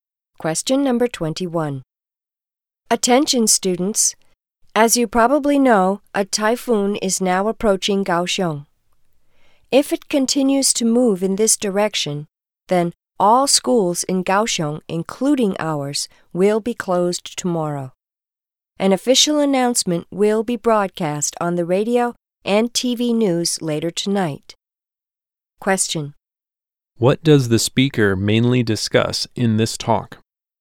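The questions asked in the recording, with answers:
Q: What does the speaker mainly discuss in this talk?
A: Schools may close tomorrow because of a typhoon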